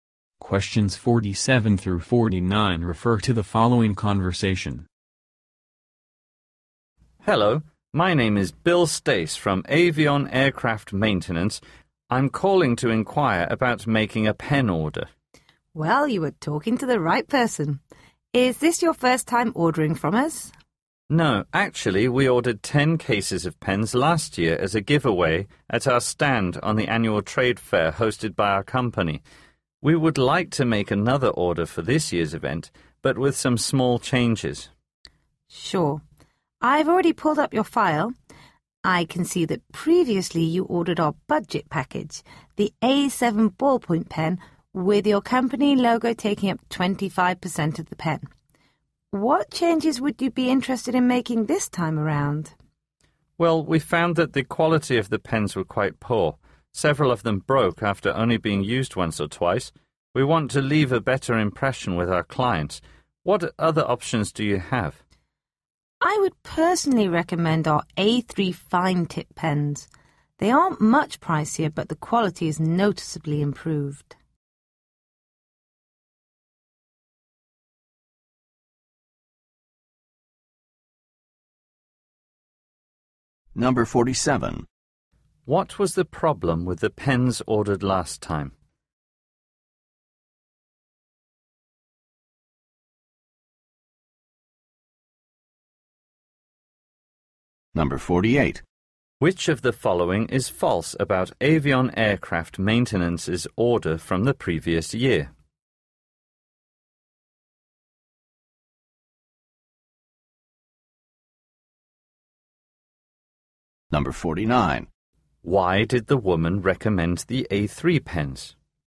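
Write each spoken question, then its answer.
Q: What was the problem with the pens ordered last time?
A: Poor quality; they broke easily

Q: Why did the woman recommend the A3 pens?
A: Better quality for not much more money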